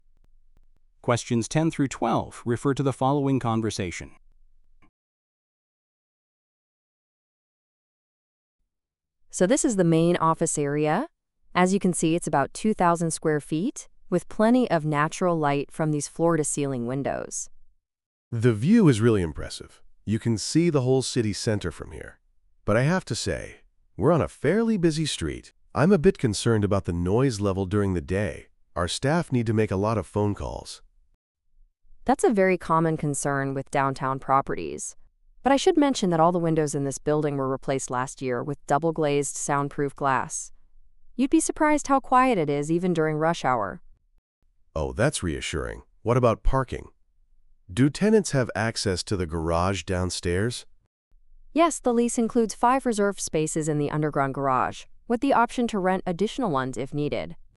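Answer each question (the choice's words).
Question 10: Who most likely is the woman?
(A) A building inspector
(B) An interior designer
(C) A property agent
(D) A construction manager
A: A property agent

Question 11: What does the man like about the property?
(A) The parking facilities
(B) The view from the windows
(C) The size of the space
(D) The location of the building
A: The view from the windows

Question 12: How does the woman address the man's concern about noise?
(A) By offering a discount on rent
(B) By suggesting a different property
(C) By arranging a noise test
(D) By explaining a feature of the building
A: By explaining a feature of the building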